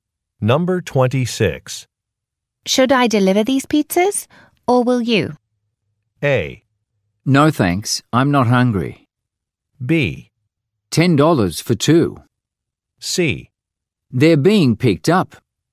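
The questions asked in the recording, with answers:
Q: Should I deliver these pizzas, or will you?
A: C: They're being picked up.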